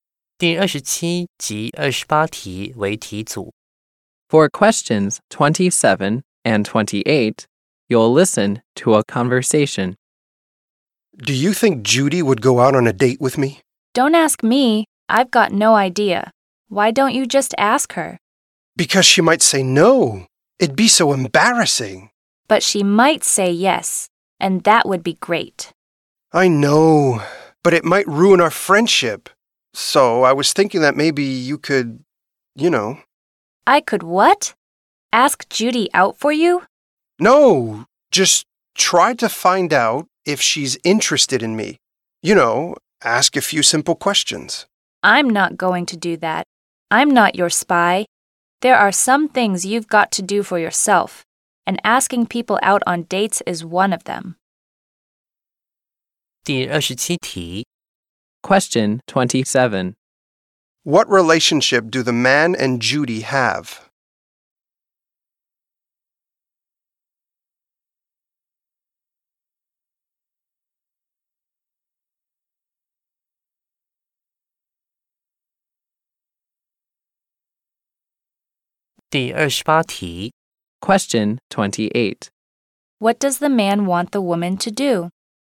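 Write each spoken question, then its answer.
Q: What relationship do the man and Judy have?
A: They are friends.

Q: What does the man want the woman to do?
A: Find out if Judy is interested in him.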